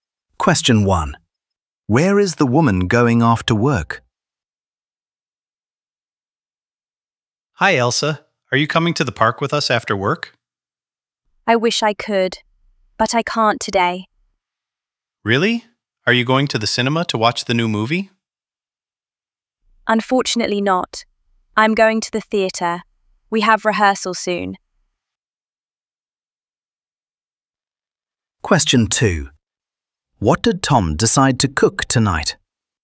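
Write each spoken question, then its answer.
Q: Where is the woman going after work?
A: to the theatre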